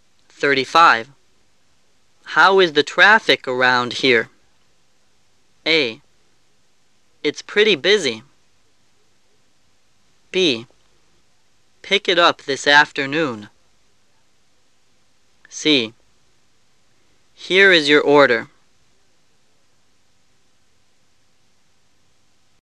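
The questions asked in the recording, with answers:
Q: How is the traffic around here?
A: A: It's pretty busy.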